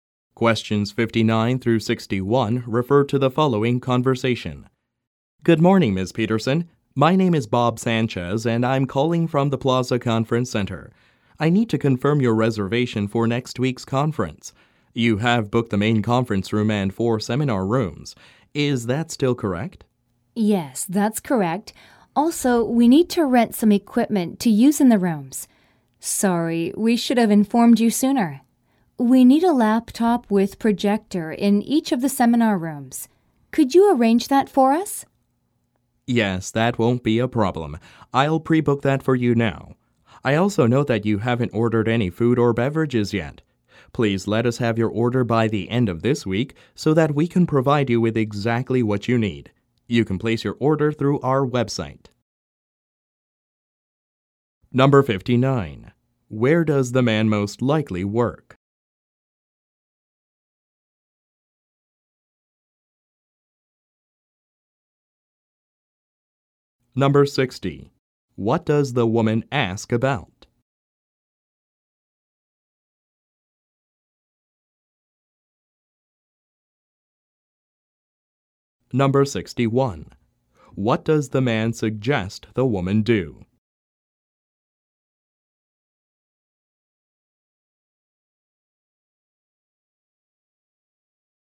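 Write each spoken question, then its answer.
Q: Where does the man most likely work?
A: At a conference center (the Plaza Conference Center)

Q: What does the woman ask about?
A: Renting equipment: a laptop with a projector in each seminar room

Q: What does the man suggest the woman do?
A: Place a food and beverage order through the website by the end of the week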